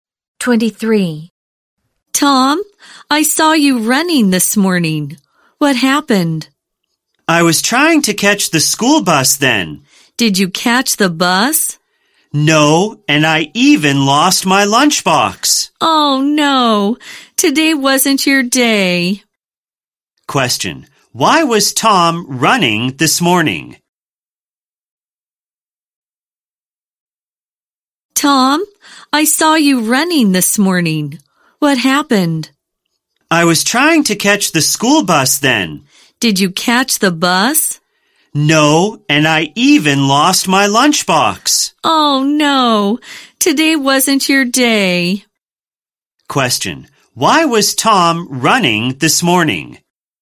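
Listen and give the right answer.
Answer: He was trying to catch the school bus.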